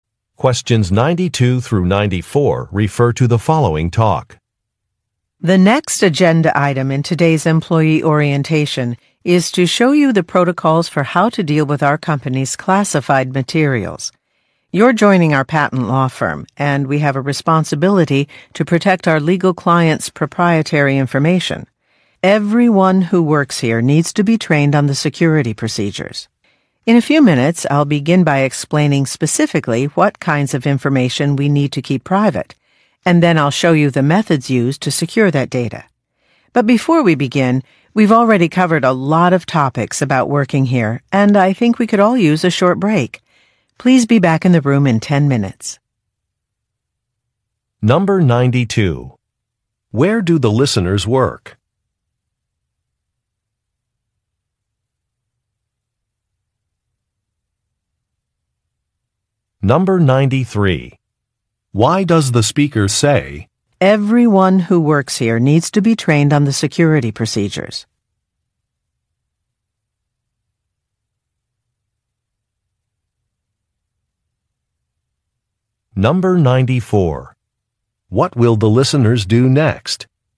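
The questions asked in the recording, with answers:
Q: Where do the listeners work?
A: At a patent law firm

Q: What will the listeners do next?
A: Take a short break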